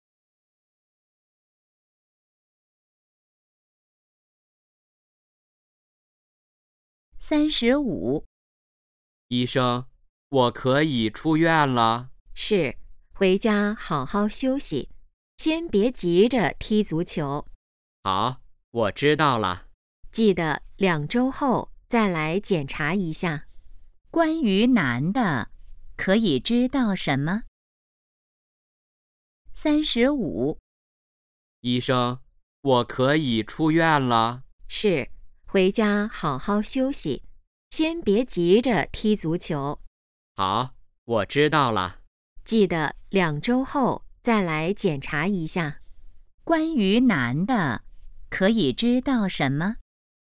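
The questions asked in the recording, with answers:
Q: 关于男的,可以知道什么?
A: 他可以出院了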